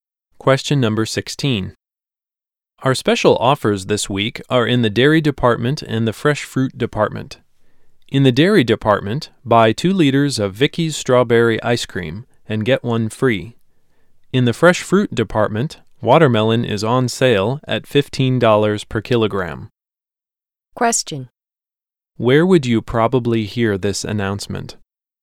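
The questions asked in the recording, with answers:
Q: Where would you probably hear this announcement?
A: In a supermarket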